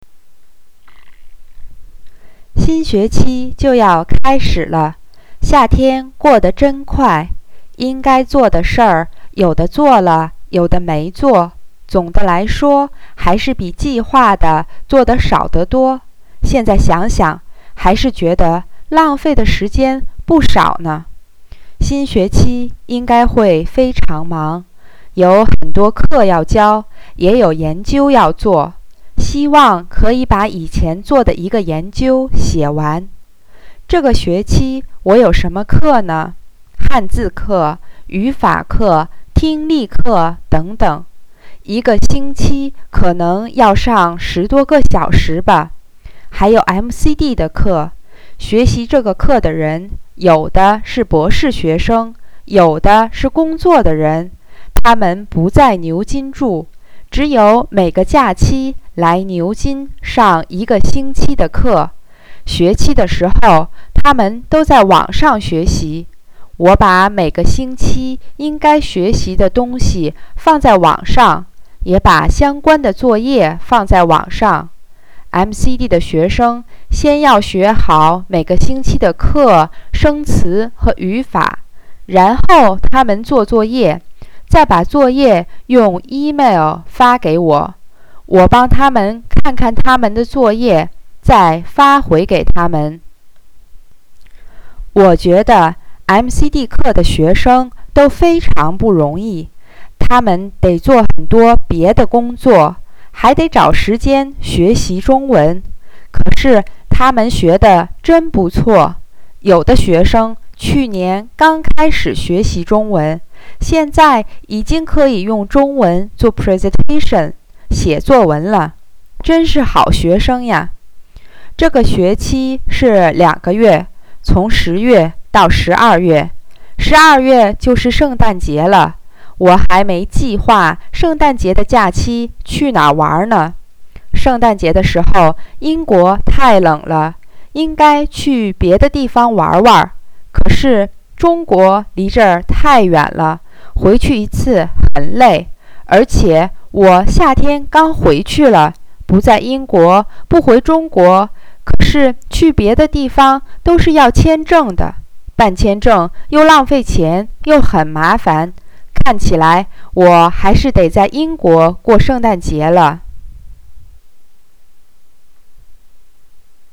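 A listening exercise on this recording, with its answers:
Please listen and answer the questions below in Chinese:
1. How do I think of my summer?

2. Why do I think that I will be very busy during the new term?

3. How does the MCD course run according to the text?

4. How do I think of the MCD students?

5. What is my plan for the Christmas holiday?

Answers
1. 夏天过得真快,做的比计划的少得多,浪费了不少时间
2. 有很多课要教,也有研究要做
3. 学生每个假期来牛津上一个星期的课,学期时在网上学习,用email交作业
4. 非常不容易,但学得真不错
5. 还没计划,看起来得在英国过圣诞节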